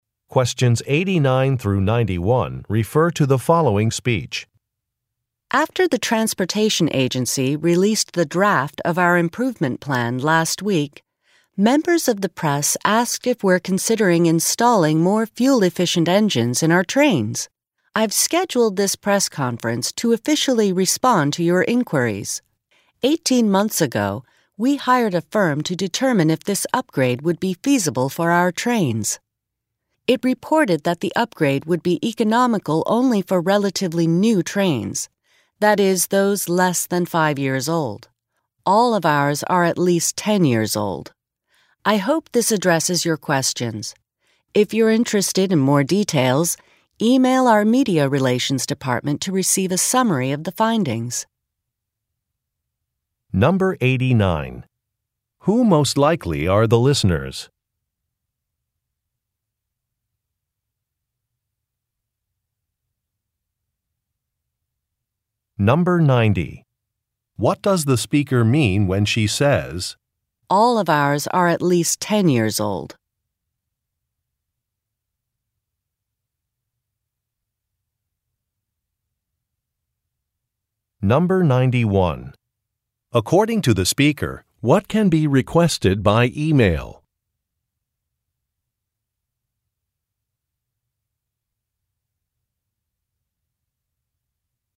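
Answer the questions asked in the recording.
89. Journalists (members of the press)
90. The engine upgrade would not be economical for the agency's trains
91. A summary of the findings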